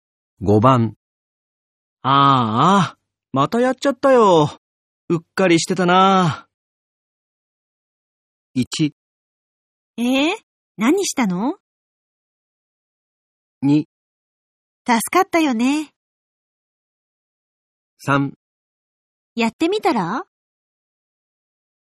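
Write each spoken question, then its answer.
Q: ああ、またやっちゃったよ。うっかりしてたな。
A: 1: 何したの?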